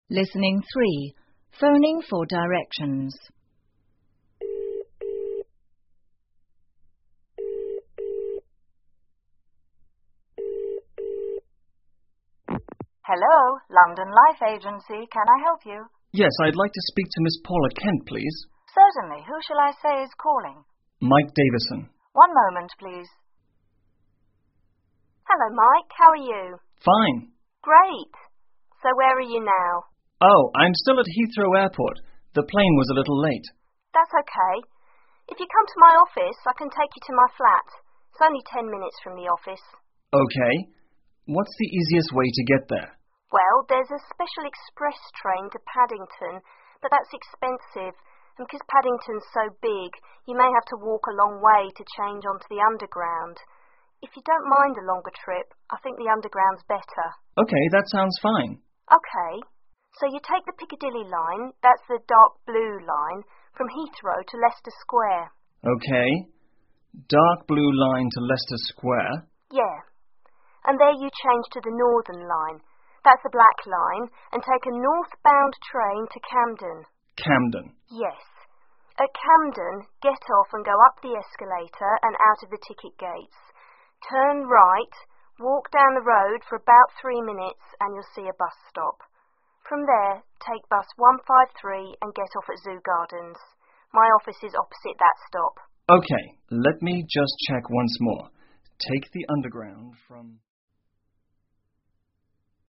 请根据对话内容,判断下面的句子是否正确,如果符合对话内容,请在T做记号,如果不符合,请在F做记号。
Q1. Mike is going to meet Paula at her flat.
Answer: F

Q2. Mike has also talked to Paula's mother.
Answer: F

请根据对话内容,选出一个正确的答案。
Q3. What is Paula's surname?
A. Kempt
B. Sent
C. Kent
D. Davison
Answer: Kent

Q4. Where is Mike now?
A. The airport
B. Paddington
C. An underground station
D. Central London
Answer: The airport

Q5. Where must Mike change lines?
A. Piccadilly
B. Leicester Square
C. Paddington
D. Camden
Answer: Leicester Square

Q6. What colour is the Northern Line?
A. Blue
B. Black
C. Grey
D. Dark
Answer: Black

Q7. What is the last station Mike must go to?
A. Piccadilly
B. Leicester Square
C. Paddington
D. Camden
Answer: Camden

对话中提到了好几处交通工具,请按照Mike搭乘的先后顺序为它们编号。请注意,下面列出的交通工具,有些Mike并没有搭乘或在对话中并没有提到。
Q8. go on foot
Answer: 3

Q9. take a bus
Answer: 4

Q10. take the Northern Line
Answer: 2

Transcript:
Secretary: Hello, London Life Agency. Can I help you?
Mike: Yes, I'd like to speak to Ms Paula Kent, please.
S: Certainly, who shall I say is calling?
M: Mike Davison.
S: One moment, please.
Paula: Hello Mike. How are you?
M: Fine.
P: Great.So where are you now?
M: Oh.I'm still at Heathrow Airport...the plane was a little late.
You come to my office, I can take you to my flat. It's only 10 minutes from the office.
M: OK.What's the easiest way to get there?
P: Well, there's a special express train to Paddington but that's expensive and because Paddington is so big, you may have to walk a long way to change onto the underground. If you don't mind a longer trip, I think the underground is better.
M: OK.That sounds fine.
P: OK.So you take the Piccadilly Line, that's the dark blue, form Heathrow to Leicester Square.
M: OK...Dark Blue line to Leicester Square.
P: Yeah.And there you change to the Northern Line, that's the black line, and take a northbound train to Camden.
M: Camden.
P: Yes.At Camden, get off and go up the escalator and out of the ticket gates. Turn right, walk down the road for about three minutes, and you'll see a bus stop. From there, take bus 153 and get off at Zoo Gardens. My office is opposite that stop.
M: OK.Let me just check once more. Take the underground from...

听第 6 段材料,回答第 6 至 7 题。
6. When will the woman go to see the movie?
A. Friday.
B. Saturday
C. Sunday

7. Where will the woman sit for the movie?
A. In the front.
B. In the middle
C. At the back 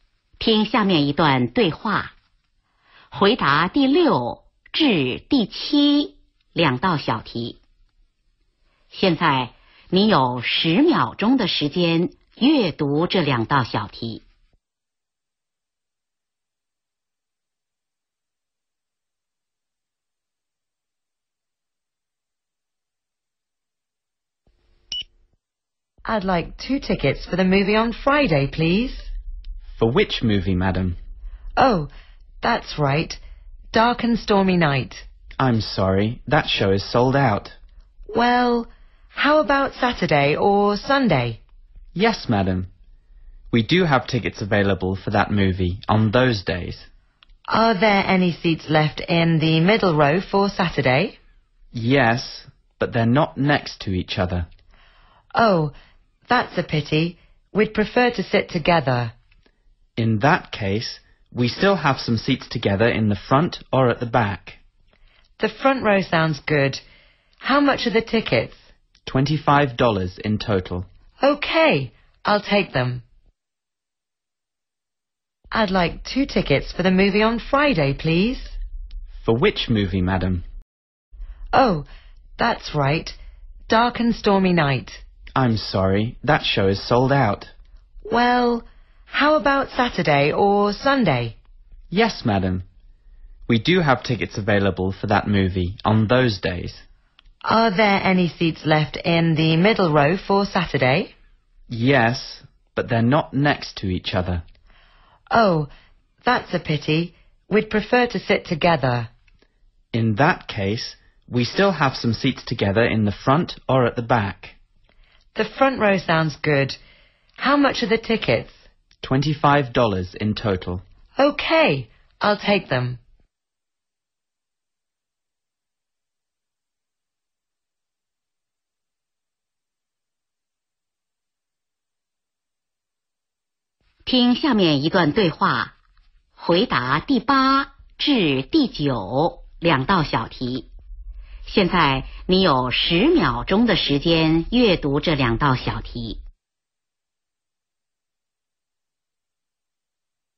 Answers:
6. Saturday
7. In the front.

